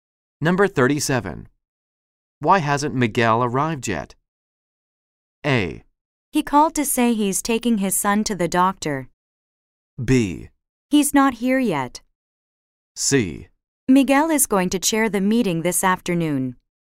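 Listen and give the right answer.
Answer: A: He called to say he's taking his son to the doctor.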